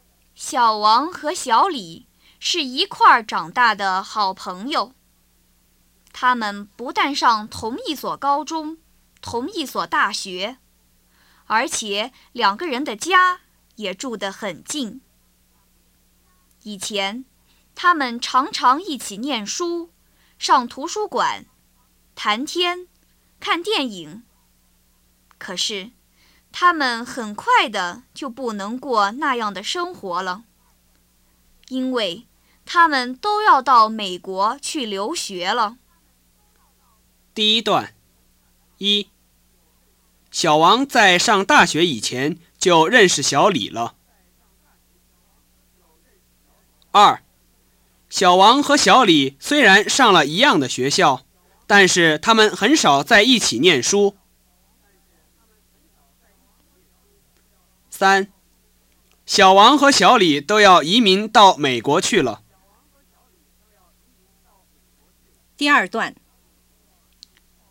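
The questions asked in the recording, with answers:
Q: 小王和小李虽然上了一样的学校,但是他们很少在一起念书。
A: 不对

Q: 小王和小李都要移民到美国去了。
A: 不对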